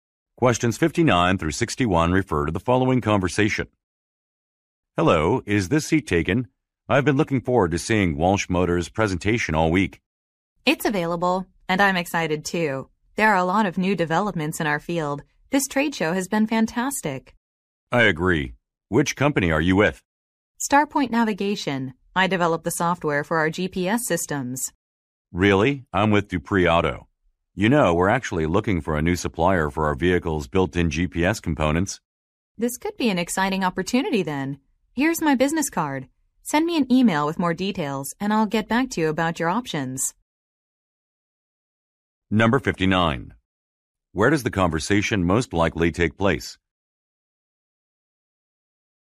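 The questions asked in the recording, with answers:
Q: Where does the conversation most likely take place?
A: At a trade show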